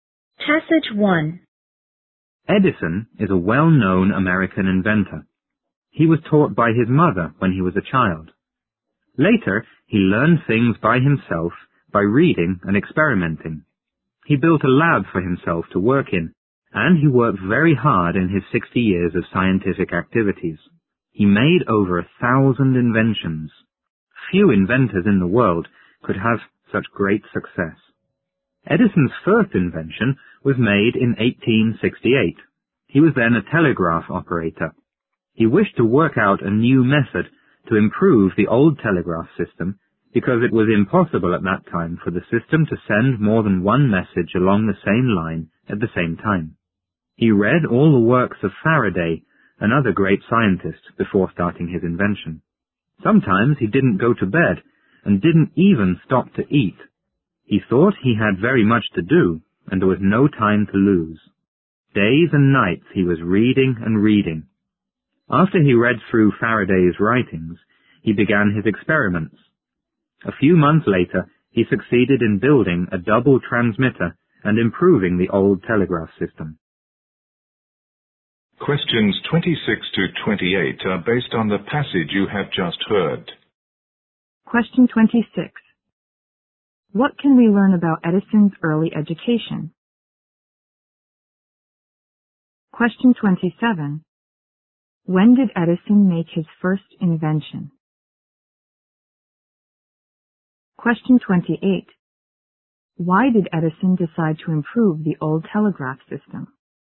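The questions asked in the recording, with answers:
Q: What can we learn about Edison's early education?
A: He was taught by his mother

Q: When did Edison make his first invention?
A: In 1868

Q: Why did Edison decide to improve the old telegraph system?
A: It could not send more than one message along the same line at the same time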